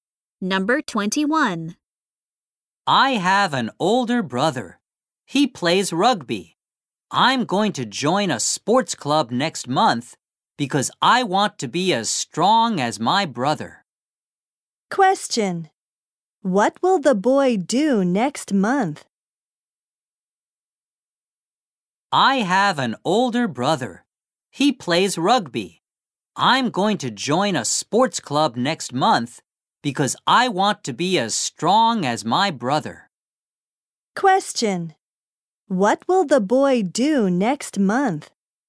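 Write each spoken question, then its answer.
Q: What will the boy do next month?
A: Join a sports club.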